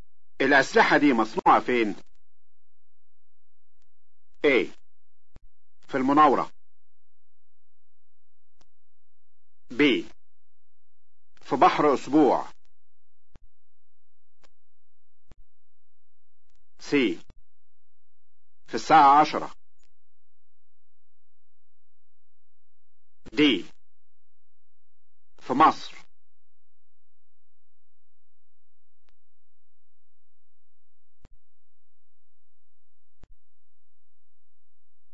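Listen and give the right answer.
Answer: D: في مصر.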